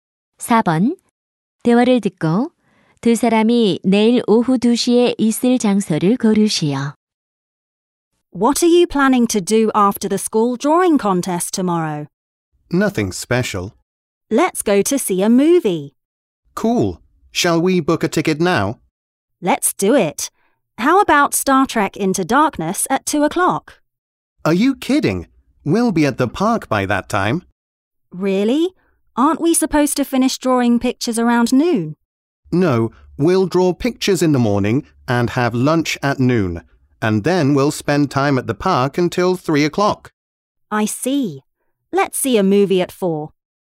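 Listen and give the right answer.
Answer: 공원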